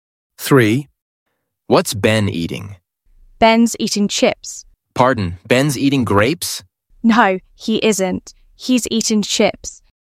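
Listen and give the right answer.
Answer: chips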